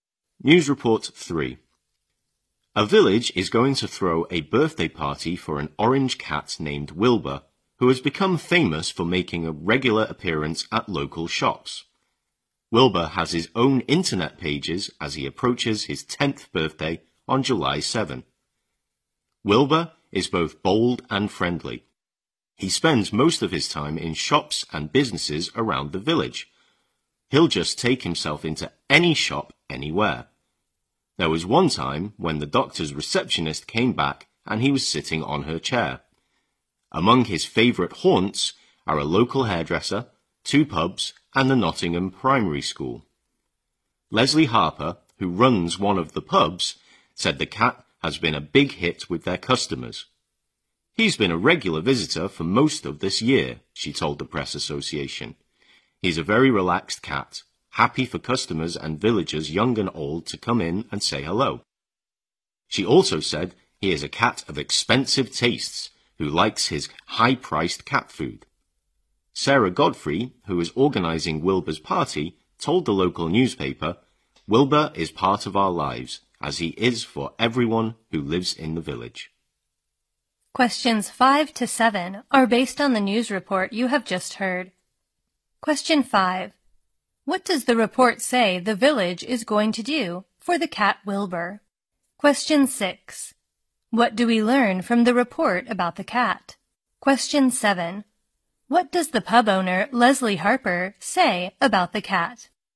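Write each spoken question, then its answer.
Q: What does the report say the village is going to do for the cat Wilbur?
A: Throw a birthday party for him

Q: What do we learn from the report about the cat?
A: He is bold and friendly and spends most of his time in local shops and businesses

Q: What does the pub owner, Leslie Harper, say about the cat?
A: He has been a big hit with customers and likes expensive cat food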